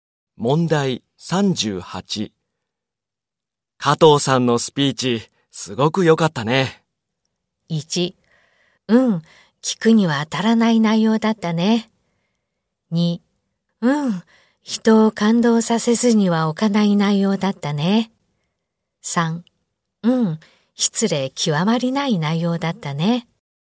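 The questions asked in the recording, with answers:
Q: 加藤さんのスピーチ、すごく良かったね。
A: 2: うん、人を感動させずには置かない内容だったね。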